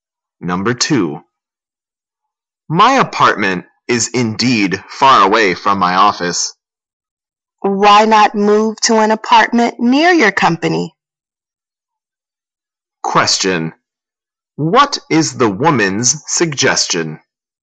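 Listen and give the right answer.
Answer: Move to an apartment near his company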